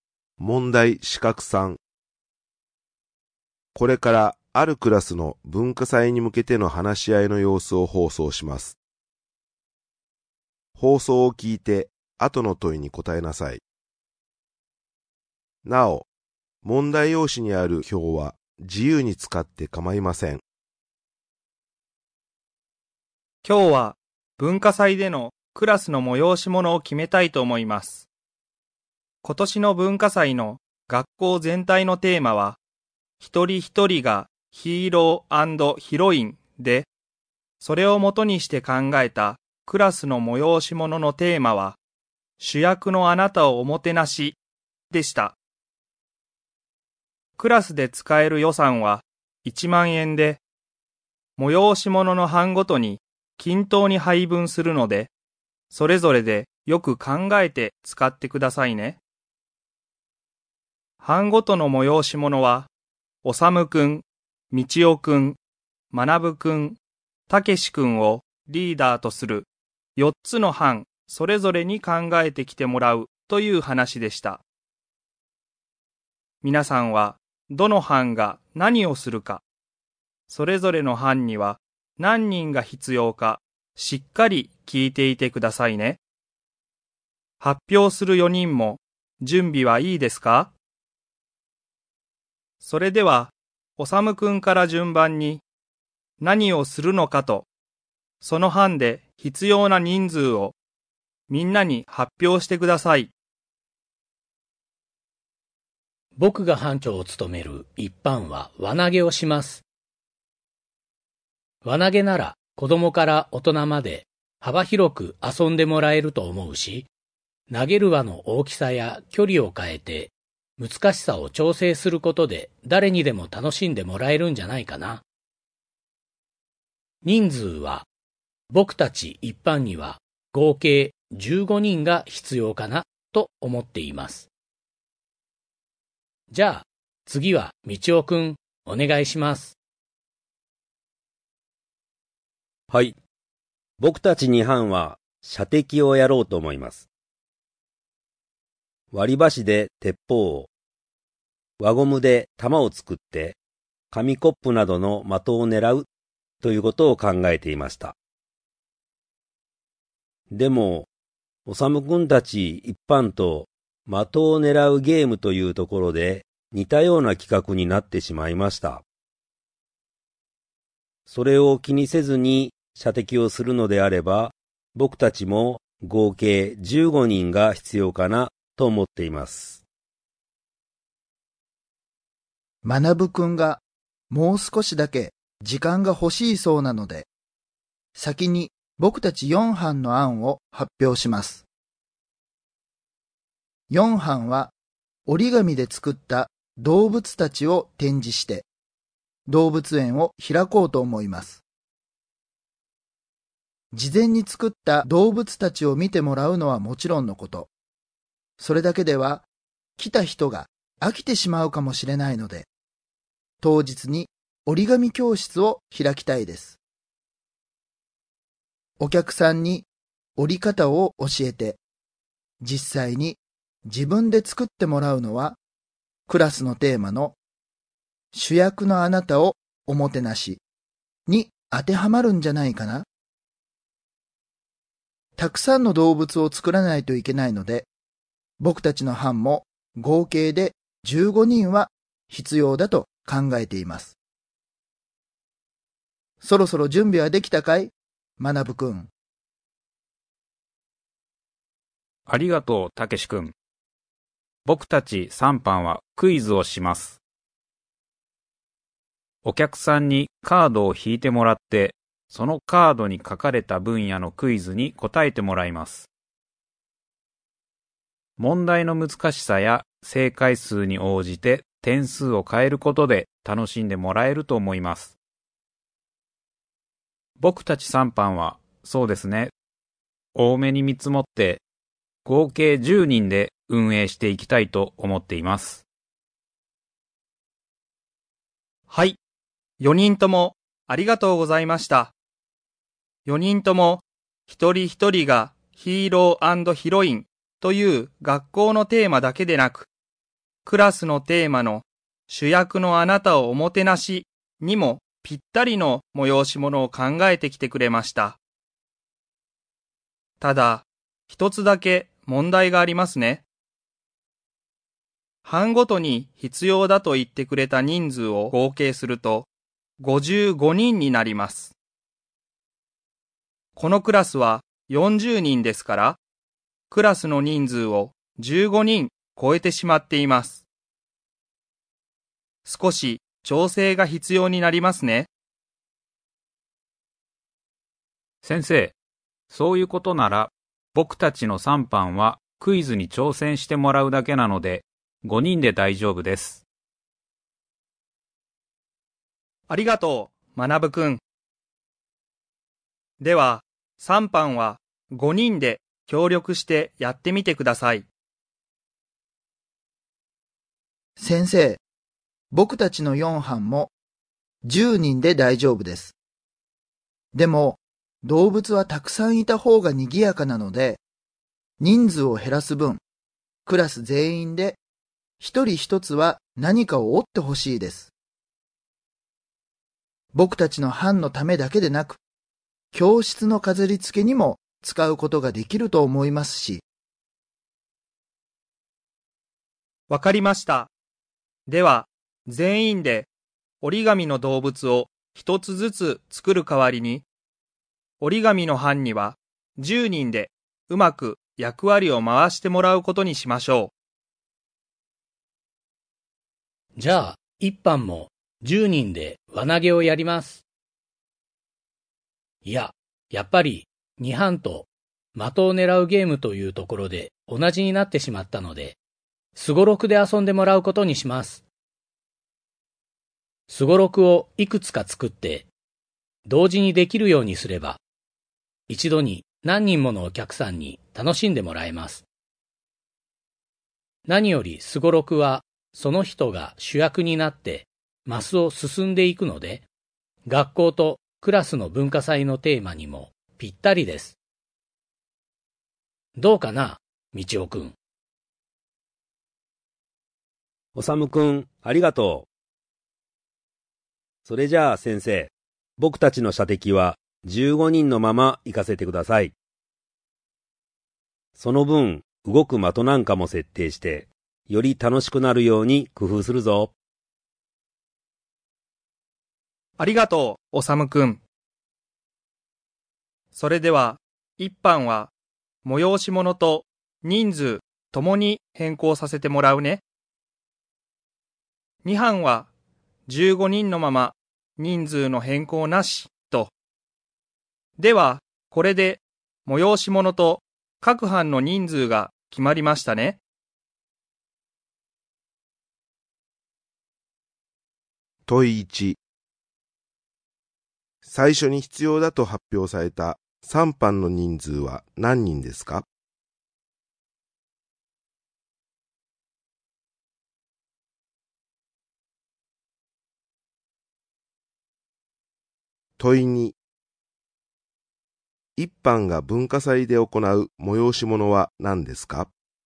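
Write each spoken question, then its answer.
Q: 最初に必要だと発表された3班の人数は何人ですか?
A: 10人

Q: 一班が文化祭で行う催し物は何ですか?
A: すごろく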